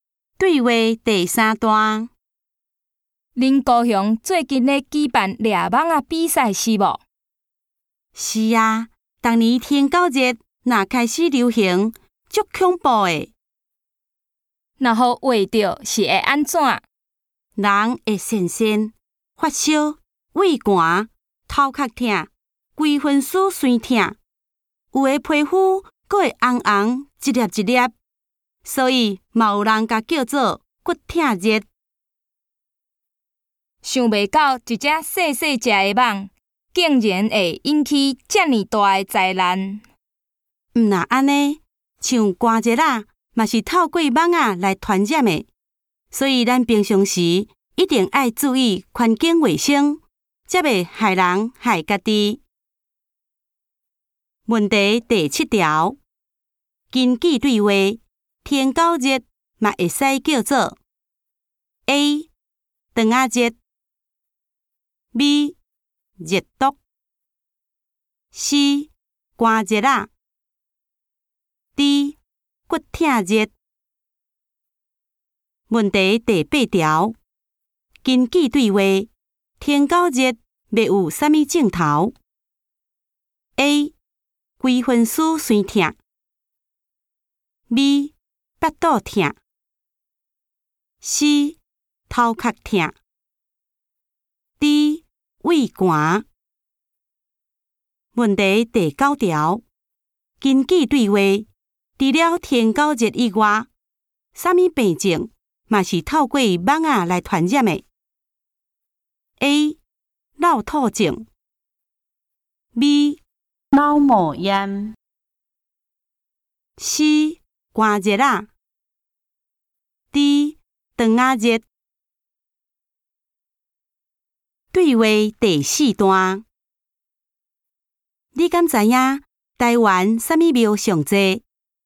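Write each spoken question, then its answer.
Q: 根据对话,天够热嘛会使叫做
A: D: 骨痛热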